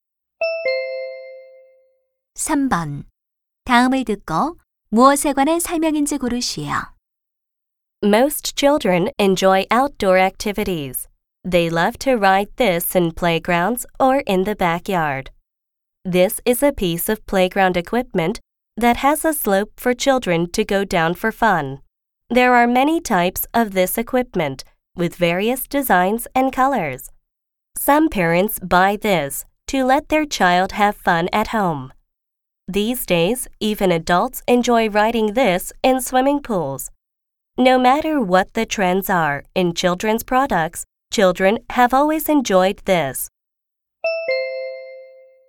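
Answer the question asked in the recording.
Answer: 미끄럼틀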